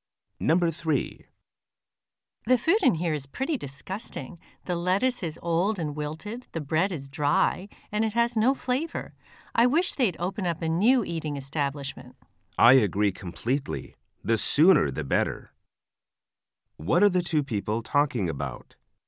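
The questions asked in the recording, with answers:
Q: What are the two people talking about?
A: The bad food in the cafeteria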